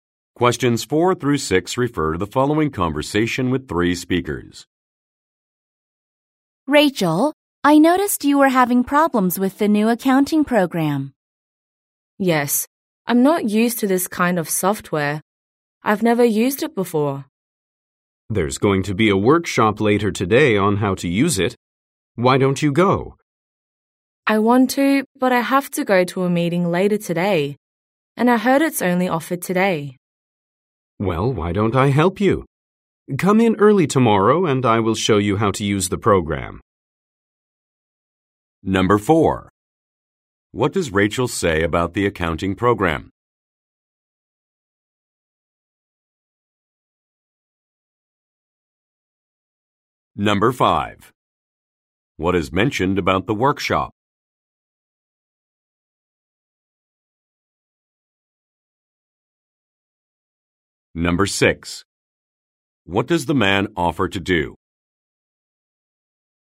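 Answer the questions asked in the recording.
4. She has never used it before.
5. It is only offered today.
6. Show her how to use the program tomorrow.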